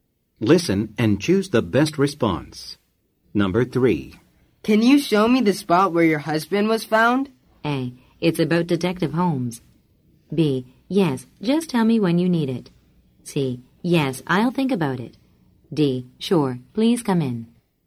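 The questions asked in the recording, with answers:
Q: Can you show me the spot where your husband was found?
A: D: Sure, please come in.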